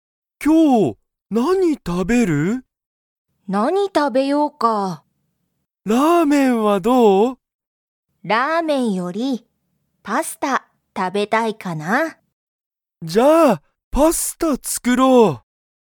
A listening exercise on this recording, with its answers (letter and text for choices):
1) サキは、____を食たべたい。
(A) ラーメン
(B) コーヒー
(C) レストラン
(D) パスタ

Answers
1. (D) パスタ

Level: Level 1